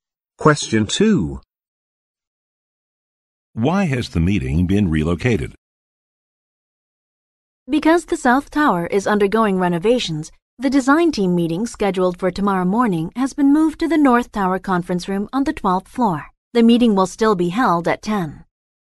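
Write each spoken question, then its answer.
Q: Why has the meeting been relocated?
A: Because the South Tower is undergoing renovations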